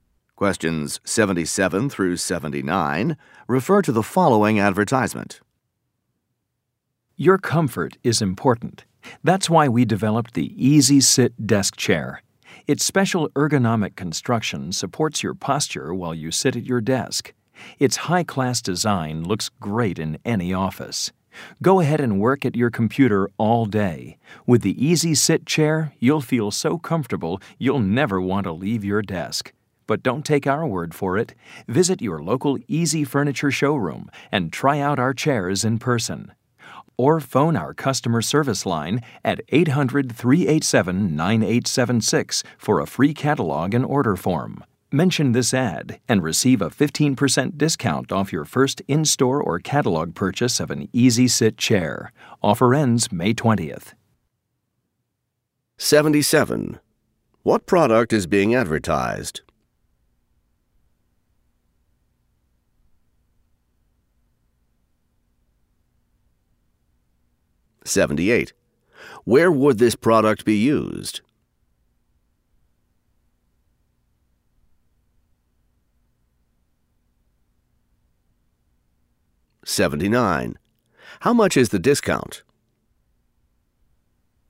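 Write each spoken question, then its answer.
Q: What product is being advertised?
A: A desk chair

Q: Where would this product be used?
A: In an office

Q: How much is the discount?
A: 15%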